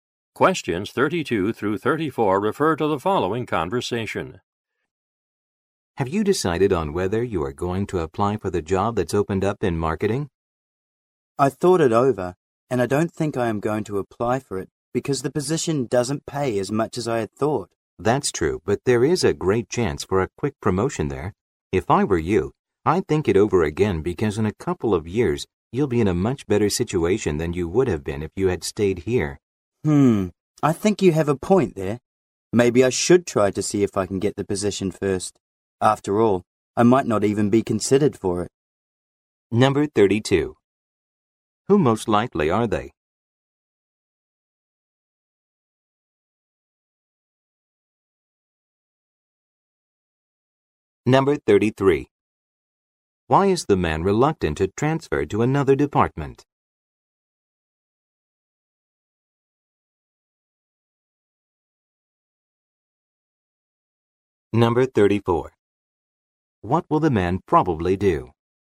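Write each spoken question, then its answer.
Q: Why is the man reluctant to transfer to another department?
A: The position doesn't pay as much as he thought

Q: What will the man probably do?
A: Apply for the marketing position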